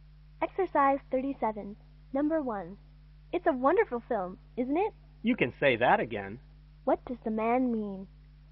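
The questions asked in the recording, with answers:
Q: What does the man mean?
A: He agrees that the film is wonderful.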